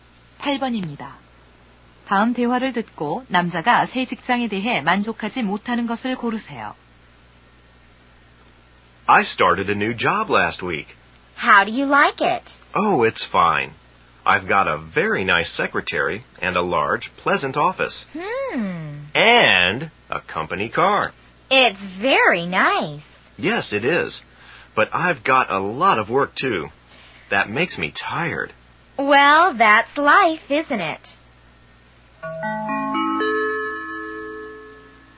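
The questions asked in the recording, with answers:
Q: 다음 대화를 듣고 남자가 새 직장에 대해 만족하지 못하는 것을 고르세요.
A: 일이 너무 많음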